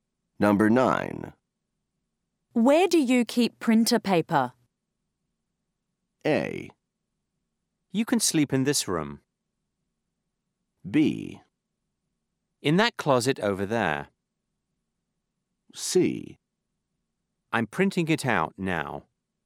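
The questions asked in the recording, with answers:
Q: Where do you keep printer paper?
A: B: In that closet over there.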